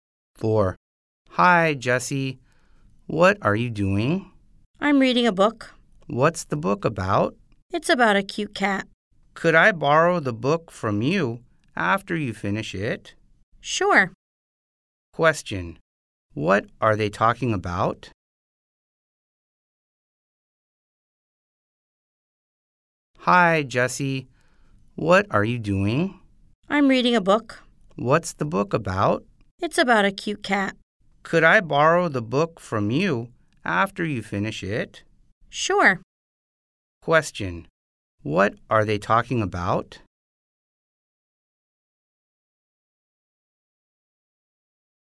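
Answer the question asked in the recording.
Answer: A book about a cute cat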